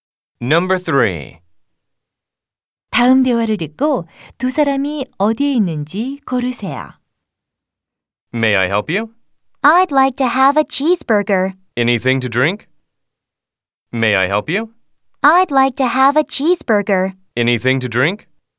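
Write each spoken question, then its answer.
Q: 다음 대화를 듣고 두 사람이 어디에 있는지 고르세요.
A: 패스트푸드점 (햄버거 가게)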